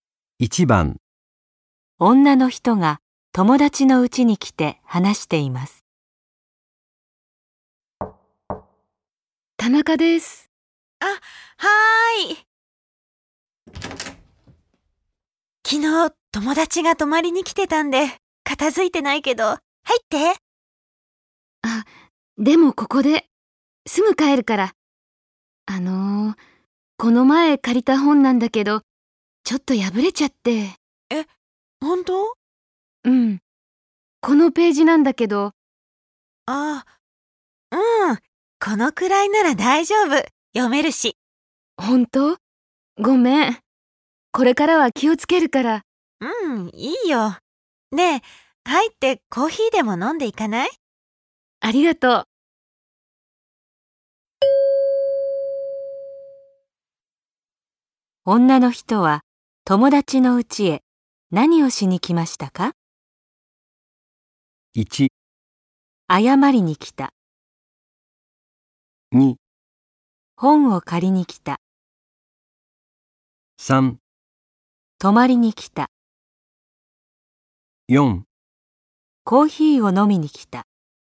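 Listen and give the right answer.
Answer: 1: 謝りに来た。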